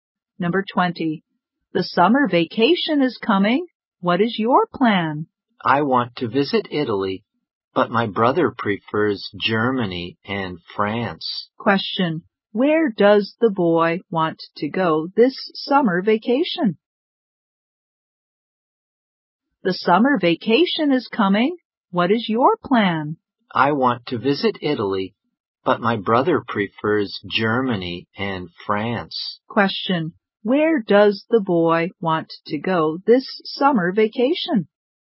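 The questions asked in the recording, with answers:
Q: Where does the boy want to go this summer vacation?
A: Italy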